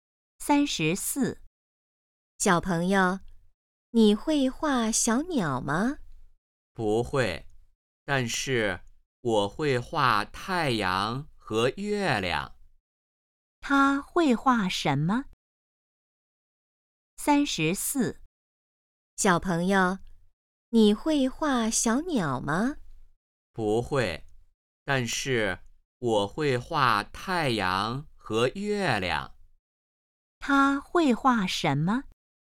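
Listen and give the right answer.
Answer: 太阳和月亮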